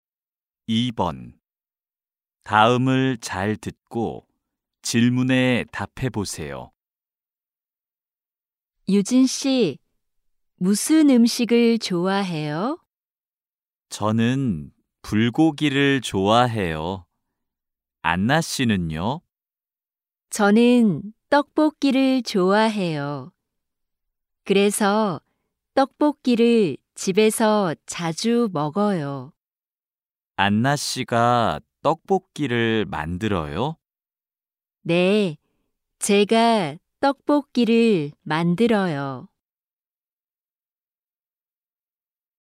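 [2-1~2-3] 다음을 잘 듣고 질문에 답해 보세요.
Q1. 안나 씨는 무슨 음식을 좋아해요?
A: 떡볶이

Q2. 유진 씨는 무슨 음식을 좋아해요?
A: 불고기

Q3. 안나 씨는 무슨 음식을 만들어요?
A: 떡볶이

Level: 1B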